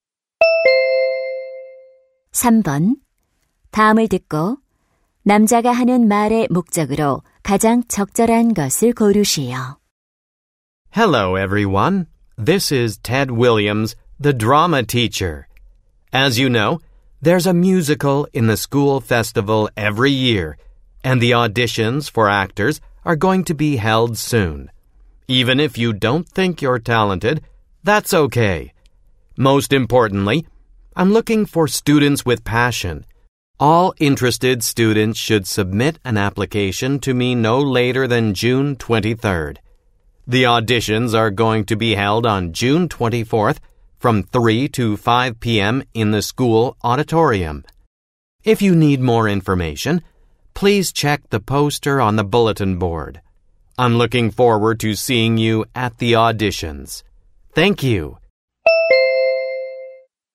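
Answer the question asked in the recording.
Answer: 학교 뮤지컬 배우 오디션 참가를 독려하려고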